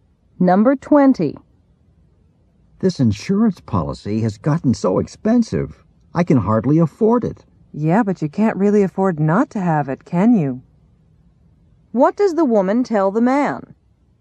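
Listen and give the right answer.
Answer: He needs the insurance even though it's expensive.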